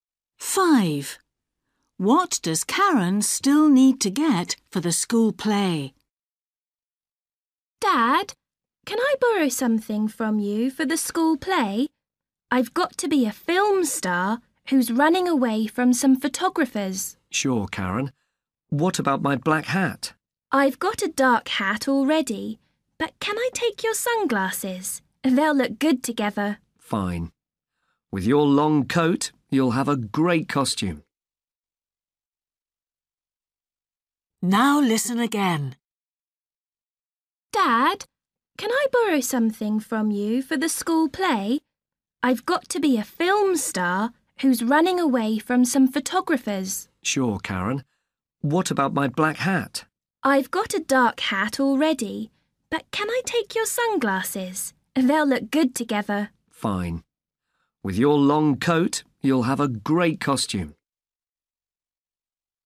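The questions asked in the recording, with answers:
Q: What does Karen still need to get for the school play?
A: sunglasses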